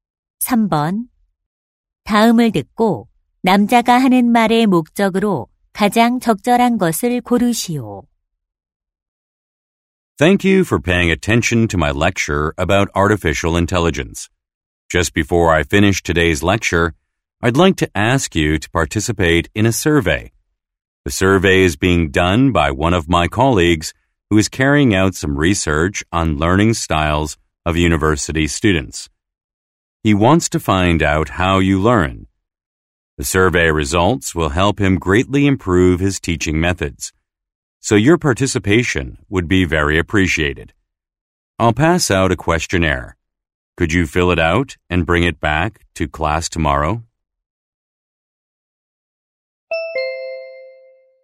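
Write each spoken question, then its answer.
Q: 다음을 듣고 남자가 하는 말의 목적으로 가장 적절한 것을 고르시오.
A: 설문 조사 참여를 요청하려고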